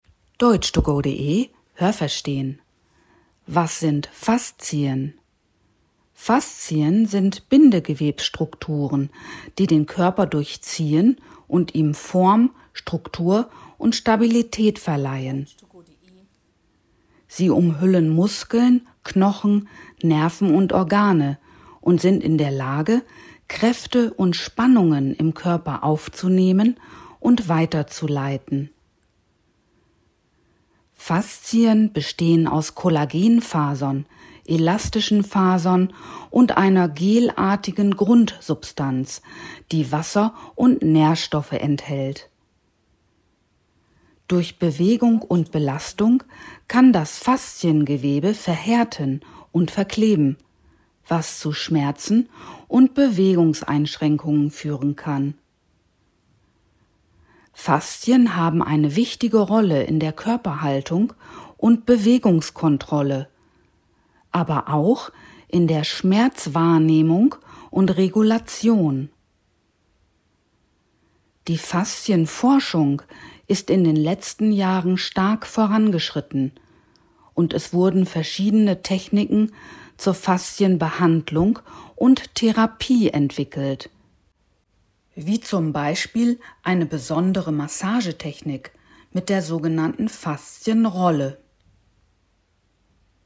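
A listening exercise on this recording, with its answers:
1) Sie durchziehen den Körper, aber was sind Faszien?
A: Bindegewebsstrukturen

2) Was verleihen Faszien dem Körper?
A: Form, Struktur und Stabilität

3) Woraus bestehen Faszien unter anderem?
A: Aus Kollagenfasern und einer gelartigen Grundsubstanz

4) Wodurch kann Fasziengewebe verkleben und verhärten?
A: Durch Bewegung und Belastung

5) Wobei spielen Faszien unter anderem eine wichtige Rolle?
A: Bei Schmerzwahrnehmung und -regulation

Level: C2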